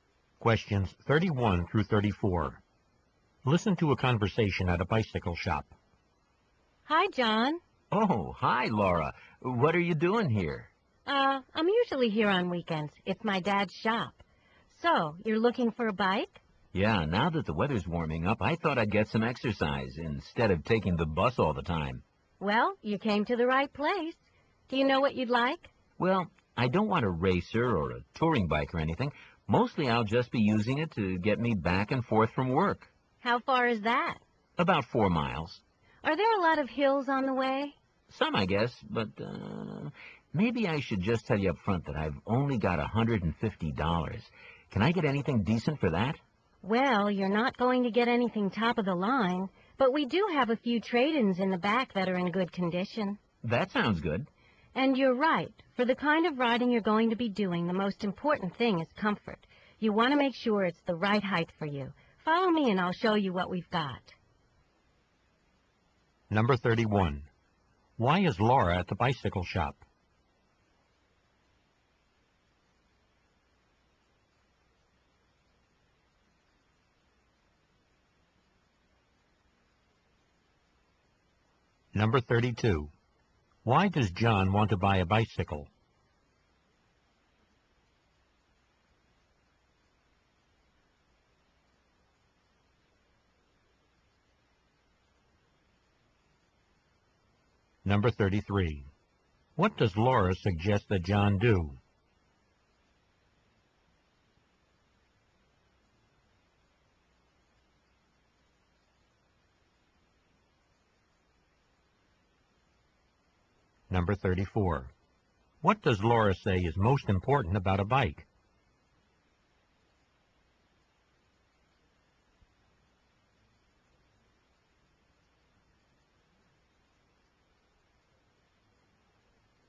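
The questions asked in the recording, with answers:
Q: Why is Laura at the bicycle shop?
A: She works there on weekends; it's her dad's shop

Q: Why does John want to buy a bicycle?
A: To get exercise riding to work instead of taking the bus

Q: What does Laura say is most important about a bike?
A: Comfort (being the right height)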